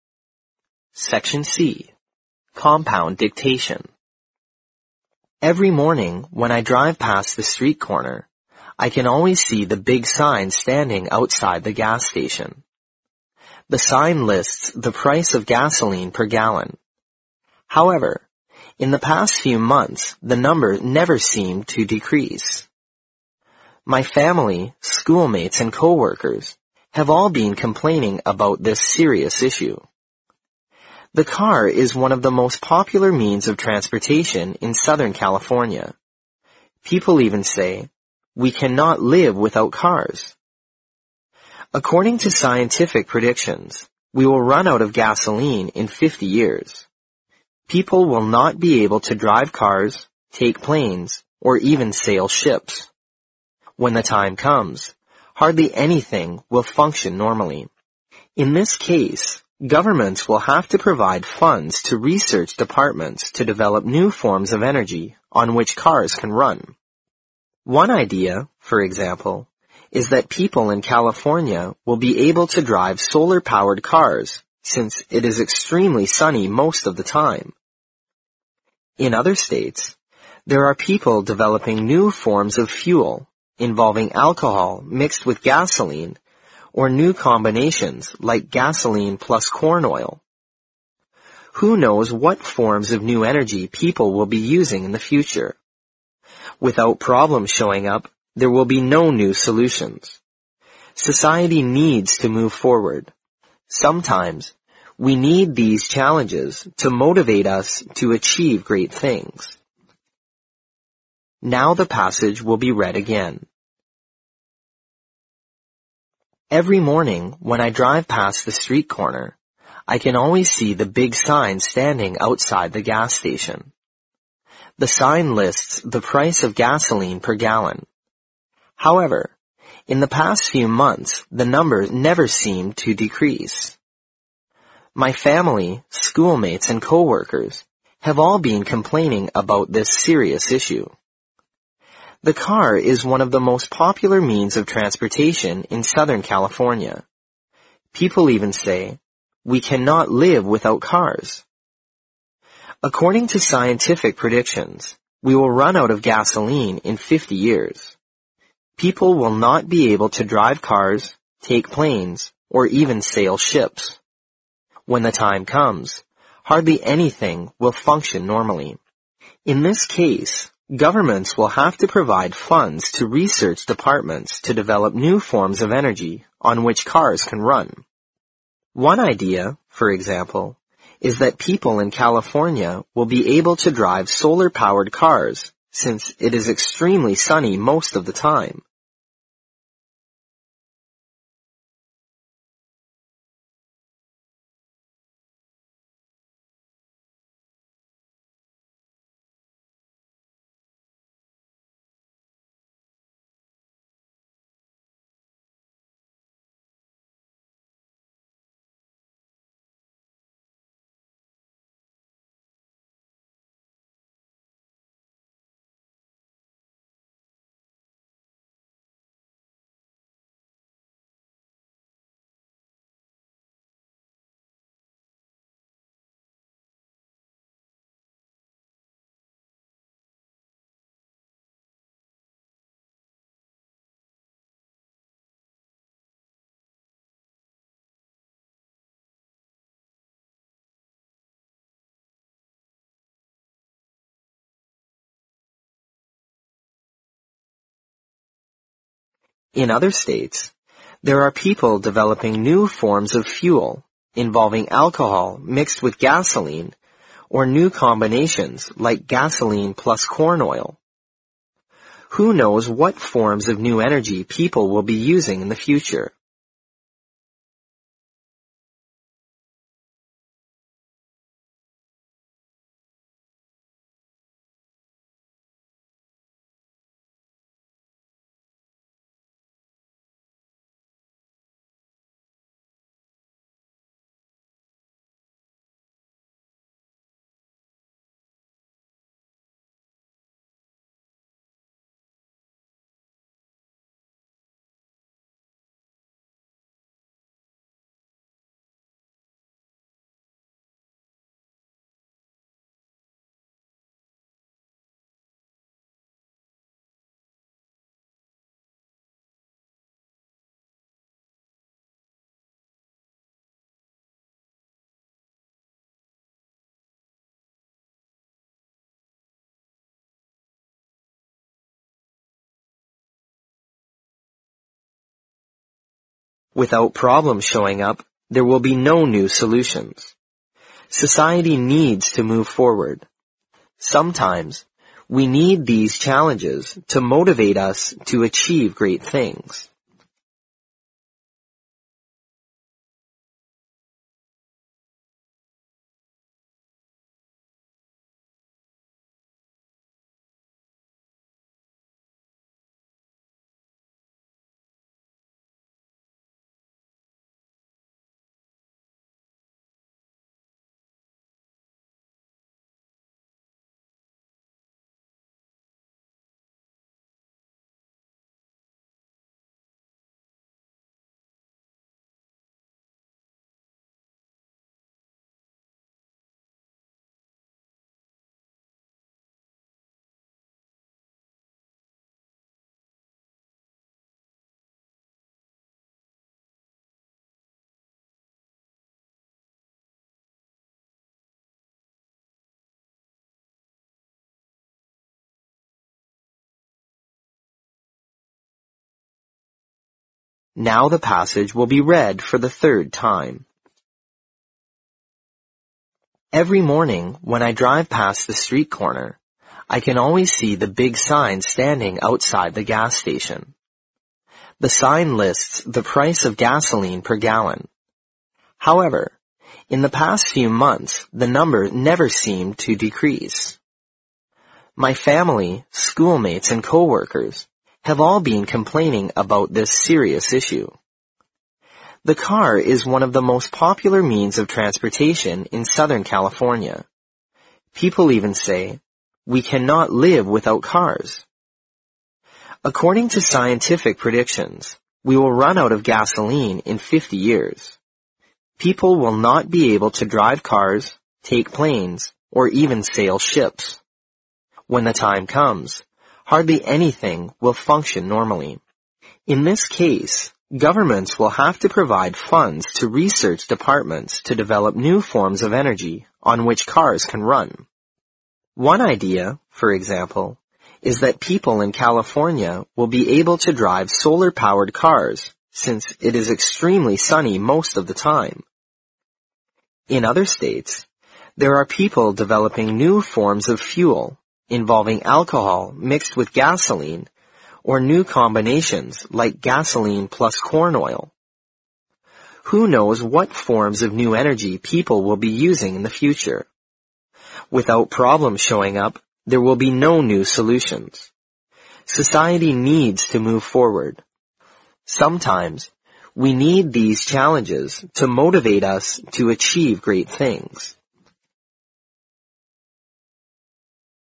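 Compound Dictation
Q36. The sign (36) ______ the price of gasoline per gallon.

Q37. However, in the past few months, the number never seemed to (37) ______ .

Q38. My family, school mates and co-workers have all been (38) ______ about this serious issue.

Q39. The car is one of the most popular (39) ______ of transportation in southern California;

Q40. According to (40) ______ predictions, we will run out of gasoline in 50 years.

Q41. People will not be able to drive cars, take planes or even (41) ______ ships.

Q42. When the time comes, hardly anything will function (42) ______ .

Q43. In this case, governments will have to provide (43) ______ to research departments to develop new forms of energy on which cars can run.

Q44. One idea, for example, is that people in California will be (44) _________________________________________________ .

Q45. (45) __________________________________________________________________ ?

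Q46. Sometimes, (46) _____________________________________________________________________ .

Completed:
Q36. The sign lists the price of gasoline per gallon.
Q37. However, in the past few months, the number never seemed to decrease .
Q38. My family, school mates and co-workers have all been complaining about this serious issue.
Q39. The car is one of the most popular means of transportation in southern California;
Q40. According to scientific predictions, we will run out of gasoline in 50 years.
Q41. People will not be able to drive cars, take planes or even sail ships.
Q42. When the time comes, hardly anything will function normally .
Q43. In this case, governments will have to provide funds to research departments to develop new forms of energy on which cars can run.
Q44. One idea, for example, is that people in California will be able to drive solar-powered cars since it is extremely sunny most of the time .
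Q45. Who knows what forms of new energy people will be using in the future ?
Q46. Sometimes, we need these challenges to motivate us to achieve great things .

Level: 新编四级听力练习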